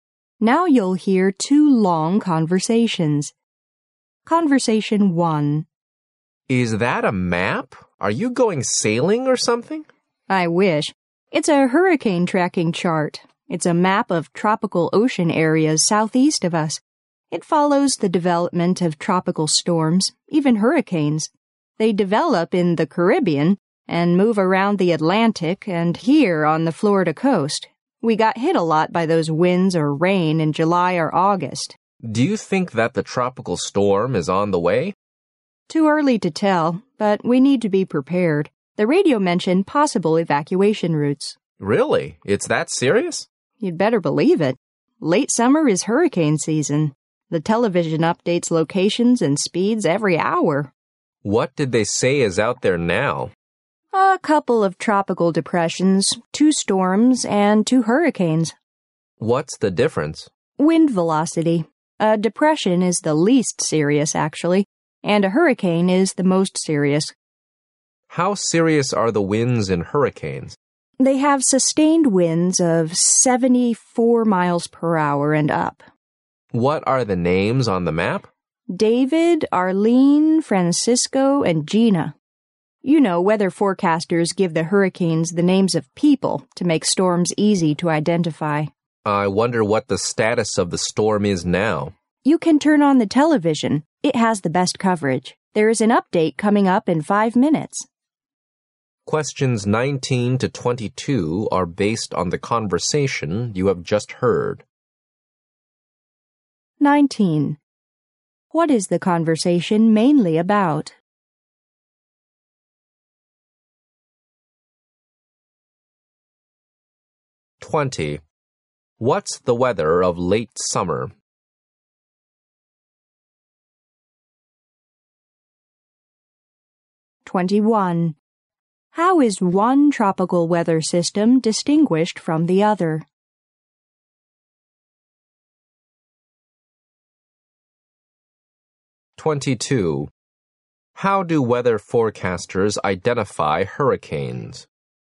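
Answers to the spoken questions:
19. Tracking tropical storms and hurricanes
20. It is hurricane season
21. By wind velocity
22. By giving them people's names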